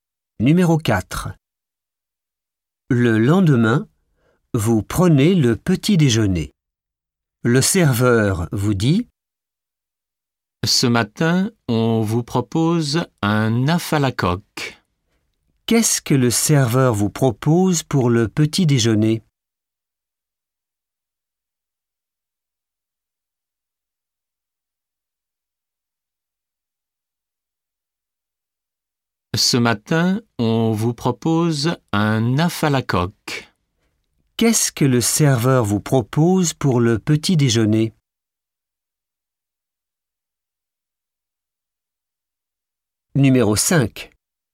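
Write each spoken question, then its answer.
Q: Qu'est-ce que le serveur vous propose pour le petit déjeuner?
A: Un œuf à la coque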